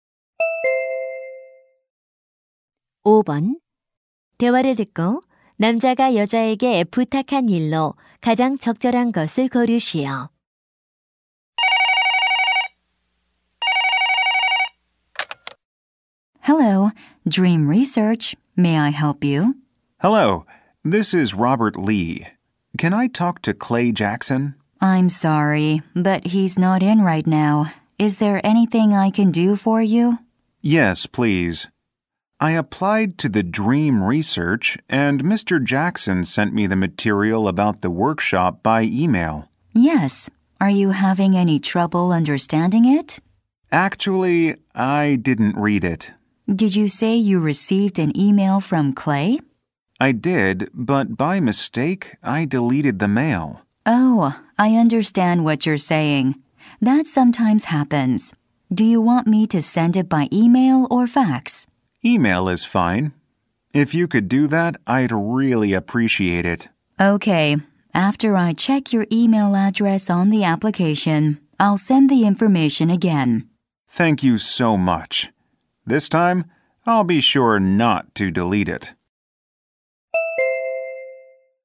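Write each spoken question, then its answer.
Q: 남자가 여자에게 부탁한 일로 가장 적절한 것을 고르시오.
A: 워크숍 자료를 이메일로 다시 보내 주기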